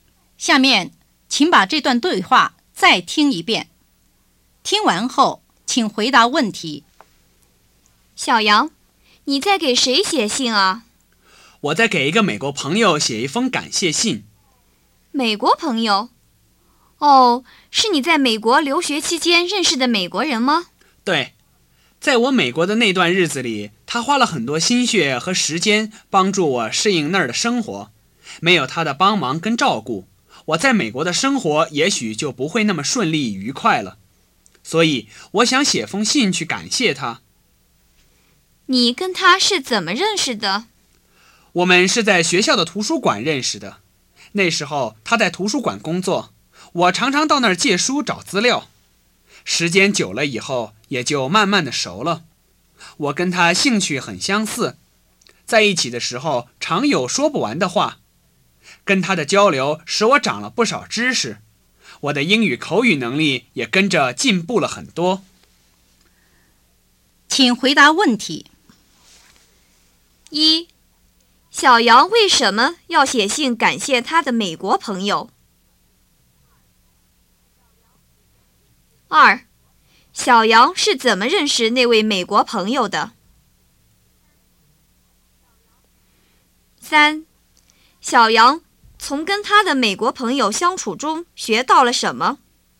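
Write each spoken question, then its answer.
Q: 小杨为什么要写信感谢他的美国朋友?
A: 因为朋友花了很多心血和时间帮助他适应美国的生活

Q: 小杨是怎么认识那位美国朋友的?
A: 在学校图书馆认识的,朋友在那儿工作,他常去借书找资料

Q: 小杨从跟他的美国朋友相处中学到了什么?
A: 长了不少知识,英语口语能力也进步了很多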